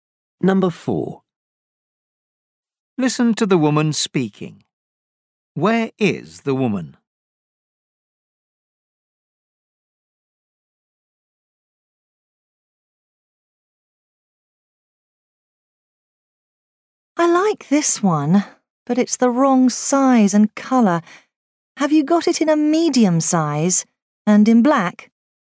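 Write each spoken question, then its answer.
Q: Where is the woman?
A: In a clothes shop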